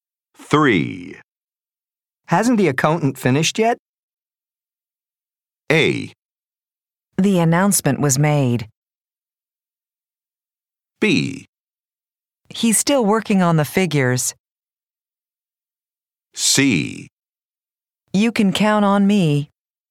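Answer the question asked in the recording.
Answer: B: He's still working on the figures.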